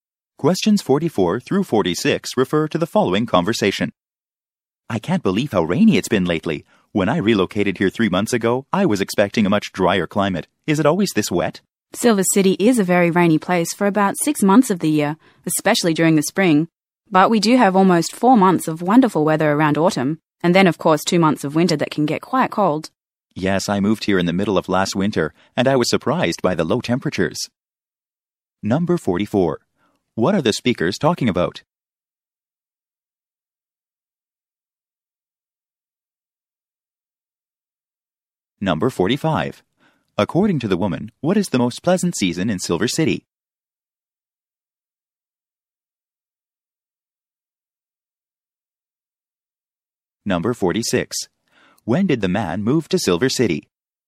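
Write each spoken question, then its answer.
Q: What are the speakers talking about?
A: The weather in Silver City

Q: According to the woman, what is the most pleasant season in Silver City?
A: Autumn

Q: When did the man move to Silver City?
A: In the middle of last winter, about 3 months ago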